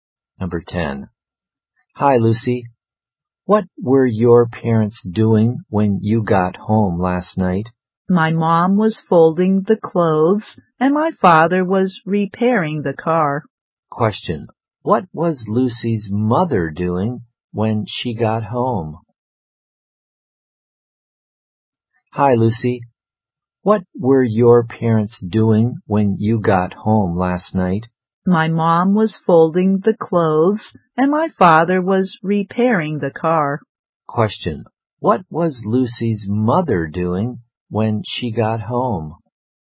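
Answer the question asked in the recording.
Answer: Folding the clothes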